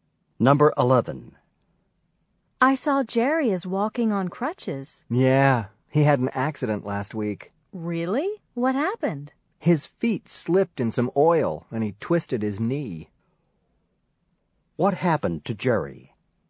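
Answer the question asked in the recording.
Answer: He slipped in oil and twisted his knee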